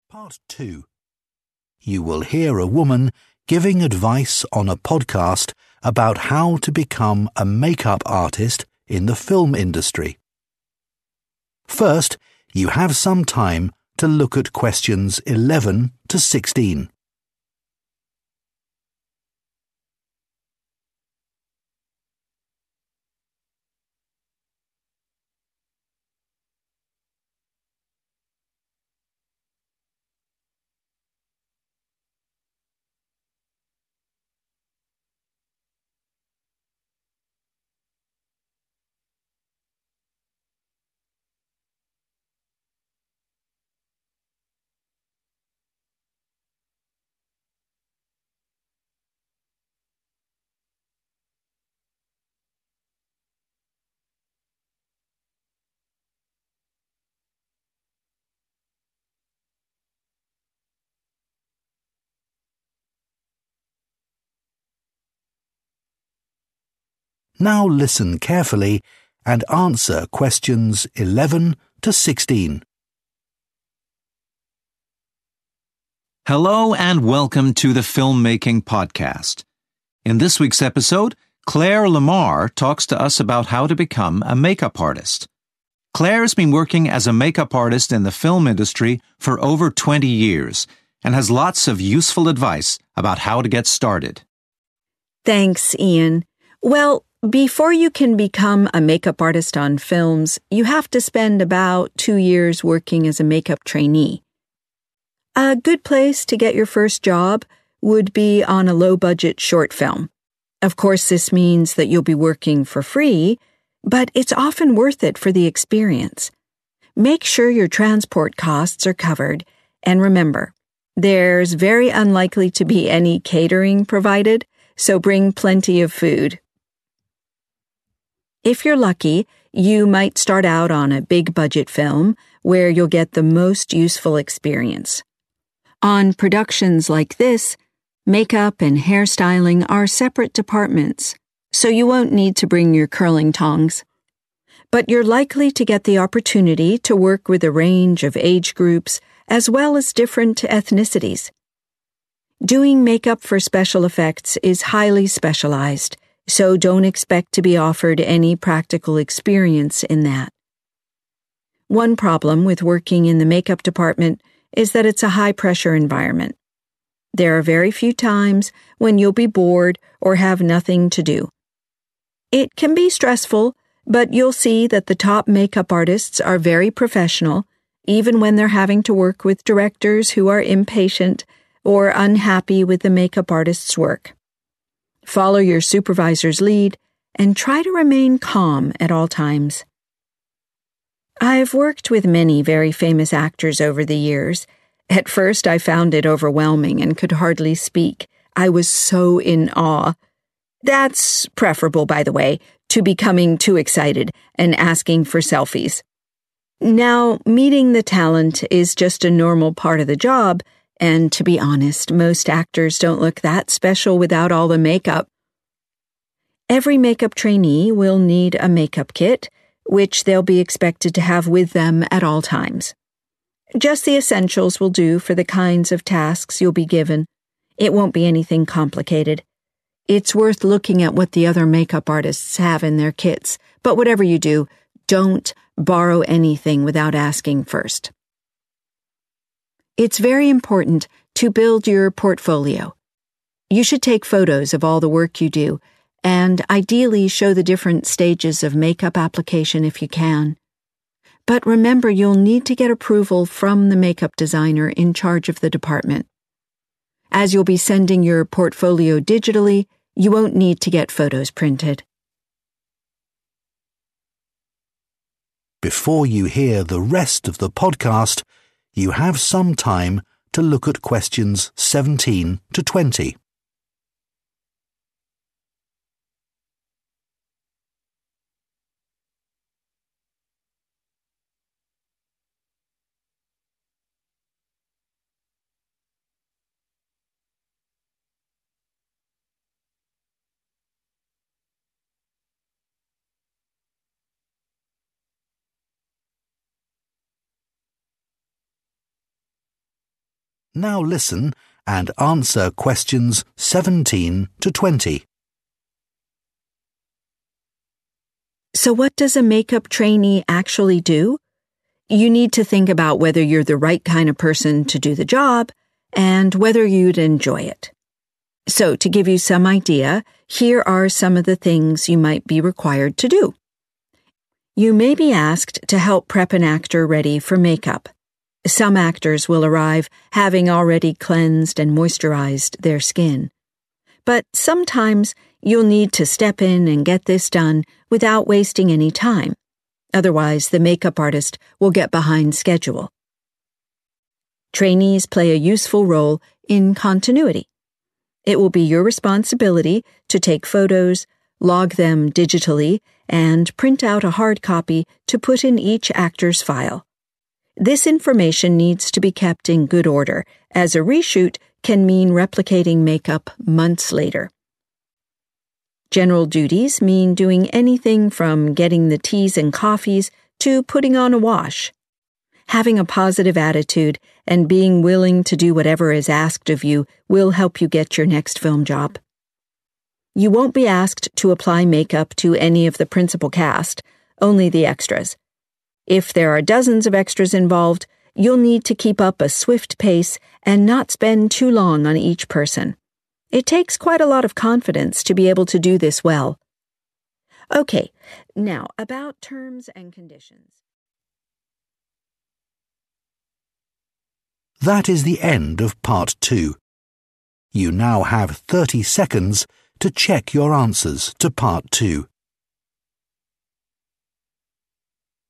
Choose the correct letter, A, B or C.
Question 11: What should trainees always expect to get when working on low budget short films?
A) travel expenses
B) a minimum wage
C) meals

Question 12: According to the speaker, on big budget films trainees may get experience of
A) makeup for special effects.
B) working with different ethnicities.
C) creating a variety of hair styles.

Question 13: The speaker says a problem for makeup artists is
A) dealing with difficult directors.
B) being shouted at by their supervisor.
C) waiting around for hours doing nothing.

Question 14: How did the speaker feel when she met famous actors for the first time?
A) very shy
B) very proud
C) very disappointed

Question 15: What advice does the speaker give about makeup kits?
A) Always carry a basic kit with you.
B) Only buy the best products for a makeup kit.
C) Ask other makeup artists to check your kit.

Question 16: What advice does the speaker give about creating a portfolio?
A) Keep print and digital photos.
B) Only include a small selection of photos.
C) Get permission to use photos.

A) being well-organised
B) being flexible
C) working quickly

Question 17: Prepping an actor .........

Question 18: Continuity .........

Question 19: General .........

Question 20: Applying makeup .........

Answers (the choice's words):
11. travel expenses
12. working with different ethnicities.
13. dealing with difficult directors.
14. very shy
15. Always carry a basic kit with you.
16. Get permission to use photos.
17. working quickly
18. being well-organised
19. being flexible
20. working quickly

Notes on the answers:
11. Cô ấy nhấn mạnh là phải đảm bảo được chi trả chi phí đi lại.
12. Người phụ nữ khẳng định bạn sẽ có cơ hội làm việc với nhiều nhóm tuổi khác nhau cũng như các sắc tộc khác nhau.
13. Các chuyên gia trang điểm hàng đầu đôi khi phải làm việc với những đạo diễn thiếu kiên nhẫn hoặc không hài lòng với sản phẩm, điều này tương ứng với đáp án A dealing with difficult directors (đối phó với những đạo diễn khó tính)
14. Lúc đầu, cô ấy cảm thấy vô cùng choáng ngợp và hầu như không thể thốt lên lời vì quá kinh ngạc và ngưỡng mộ. Trạng thái e dè, không dám nói chuyện này tương ứng với việc cảm thấy rất rụt rè, ngại ngùng, vì vậy đáp án A là chính xác.
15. Người nói cho biết mỗi thực tập sinh đều cần một bộ dụng cụ trang điểm và họ được yêu cầu phải luôn mang theo bên mình mọi lúc và chỉ cần những món đồ cơ bản, thiết yếu là đủ vì các công việc được giao sẽ không có gì quá phức tạp. Ý này hoàn toàn trùng khớp với đáp án A
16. Cô ấy nhấn mạnh bạn sẽ cần phải có sự chấp thuận/cho phép từ nhà thiết kế trang điểm trưởng bộ phận. Điều này hoàn toàn đồng nghĩa với đáp án C Get permission to use photos (xin phép để được sử dụng hình ảnh).
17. Người nói nhắc nhở rằng khi chuẩn bị da cho diễn viên, bạn cần phải bắt tay vào làm ngay lập tức mà không được lãng phí bất kỳ thời gian nào, nếu không chuyên gia trang điểm chính sẽ bị trễ lịch trình. Yêu cầu không lãng phí thời gian đồng nghĩa với việc phải làm việc nhanh chóng.
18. Người nói nhấn mạnh lượng thông tin cần phải được sắp xếp, lưu trữ thật ngăn nắp, cẩn thận.
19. Đối với các công việc chung, nhiệm vụ có thể là bất cứ việc gì từ đi lấy trà, cà phê cho đến việc giặt giũ. Người nói khuyên bạn cần có thái độ tích cực và sẵn sàng làm bất cứ điều gì được yêu cầu.
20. Khi trang điểm cho các diễn viên quần chúng (extras), nếu số lượng lên đến hàng chục người, bạn sẽ cần phải duy trì một tốc độ thật nhanh và không được dành quá nhiều thời gian cho mỗi người.

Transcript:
Presenter: Hello and welcome to the filmmaking podcast. In this week's episode, Claire Lamar talks to us about how to become a make-up artist. Claire's been working as a make-up artist in the film industry for over 20 years and has lots of useful advice about how to get started.
Claire: Thanks, Ian. Well, before you can become a make-up artist on films, you have to spend about two years working as a make-up trainee.
A good place to get your first job would be on a low-budget short film. Of course, this means that you'll be working for free, but it's often worth it for the experience. Make sure your transport costs are covered, and remember, there's very unlikely to be any catering provided, so bring plenty of food.
If you're lucky, you might start out on a big-budget film, where you'll get the most useful experience. On productions like this, make-up and hair styling are separate departments, so you won't need to bring your curling tongs. But you're likely to get the opportunity to work with a range of age groups, as well as different ethnicities. Doing make-up for special effects is highly specialized, so don't expect to be offered any practical experience in that.
One problem with working in the make-up department is that it's a high-pressure environment. There are very few times when you'll be bored or have nothing to do. It can be stressful, but you'll see that the top make-up artists are very professional, even when they're having to work with directors who are impatient, or unhappy with the make-up artist's work. Follow your supervisor's lead, and try to remain calm at all times.
I've worked with many very famous actors over the years. At first, I found it overwhelming and could hardly speak. I was so in awe. That's preferable, by the way, to becoming too excited and asking for selfies. Now, meeting the talent is just a normal part of the job, and to be honest, most actors don't look that special without all the make-up.
Every make-up trainee will need a make-up kit, which they'll be expected to have with them at all times. Just the essentials will do for the kinds of tasks you'll be given. It won't be anything complicated. It's worth looking at what the other make-up artists have in their kits, but whatever you do, don't borrow anything without asking first.
It's very important to build your portfolio. You should take photos of all the work you do, and ideally show the different stages of make-up application if you can. But remember you'll need to get approval from the make-up designer in charge of the department. As you'll be sending your portfolio digitally, you won't need to get photos printed.
Presenter: Before you hear the rest of the podcast, you have some time to look at questions 17 to 20.
Presenter: Now listen and answer questions 17 to 20.
Claire: So what does a make-up trainee actually do? You need to think about whether you're the right kind of person to do the job, and whether you'd enjoy it. So, to give you some idea, here are some of the things you might be required to do.
You may be asked to help prep an actor ready for make-up. Some actors will arrive having already cleansed and moisturized their skin. But sometimes you'll need to step in and get this done without wasting any time. Otherwise, the make-up artist will get behind schedule.
Trainees play a useful role in continuity. It will be your responsibility to take photos, log them digitally, and print out a hard copy to put in each actor's file. This information needs to be kept in good order, as a re-shoot can mean replicating make-up months later.
General duties mean doing anything from getting the teas and coffees to putting on a wash. Having a positive attitude and being willing to do whatever is asked of you will help you get your next film job.
You won't be asked to apply make-up to any of the principal cast, only the extras. If there are dozens of extras involved, you'll need to keep up a swift pace and not spend too long on each person. It takes quite a lot of confidence to be able to do this well.
Okay. Now, about terms and conditions...